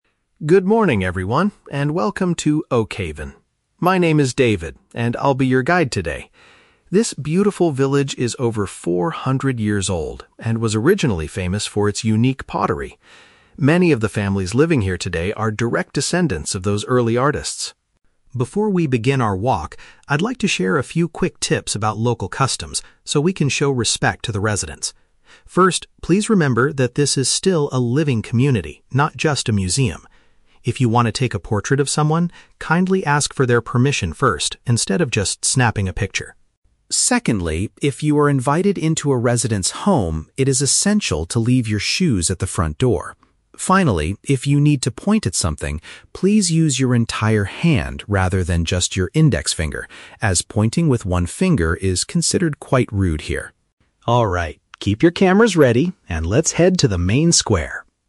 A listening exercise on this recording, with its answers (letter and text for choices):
Listen to a tour guide speaking to a group of tourists. Choose the correct answer (A, B, or C) for each question.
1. What was the village historically known for?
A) Producing special ceramic goods.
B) Being an outdoor museum for tourists.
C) Growing very old oak trees.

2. What should visitors do before photographing the local people?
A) Pay a small fee to the artists.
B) Request their approval beforehand.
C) Show them the picture immediately after taking it.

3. How does the guide advise the group to point at objects?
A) By using a single index finger.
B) By nodding their head toward the object.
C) By gesturing with their whole hand.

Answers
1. A) Producing special ceramic goods.
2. B) Request their approval beforehand.
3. C) By gesturing with their whole hand.

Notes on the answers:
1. David says the village was "originally famous for its unique pottery" (producing special ceramic goods). Option (B) is a trap; David specifically says the village is a living community and "not just a museum". Option (C) is a trap; the village is named "Oakhaven", but growing oak trees is not mentioned as what it was famous for.
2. The guide advises tourists to "kindly ask for their permission first" (request their approval beforehand) if they want to take a portrait of someone. Option (A) is never mentioned. Option (C) is a plausible friendly gesture in real life, but the guide's rule is about getting permission before snapping the picture.
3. David says, "please use your entire hand" (gesturing with their whole hand) when pointing at something. Option (A) is a trap; the guide explicitly says to do this "rather than just your index finger," because pointing with one finger is "considered quite rude." Option (B) is not mentioned in the audio.

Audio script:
David (Tour Guide): Good morning, everyone, and welcome to Oakhaven! My name is David, and I'll be your guide today. This beautiful village is over 400 years old and was originally famous for its unique pottery. Many of the families living here today are direct descendants of those early artists.
Before we begin our walk, I'd like to share a few quick tips about local customs so we can show respect to the residents. First, please remember that this is still a living community, not just a museum. If you want to take a portrait of someone, kindly ask for their permission first instead of just snapping a picture.
Secondly, if you are invited into a resident's home, it is essential to leave your shoes at the front door. Finally, if you need to point at something, please use your entire hand rather than just your index finger, as pointing with one finger is considered quite rude here.
Alright, keep your cameras ready, and let's head to the main square!